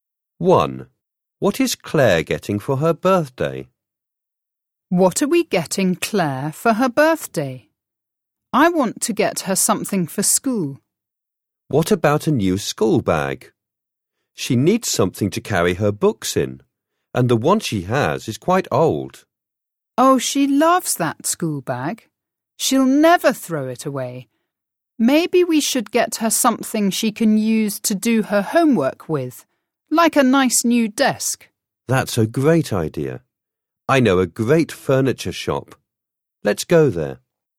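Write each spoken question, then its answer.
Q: What is Claire getting for her birthday?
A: a new desk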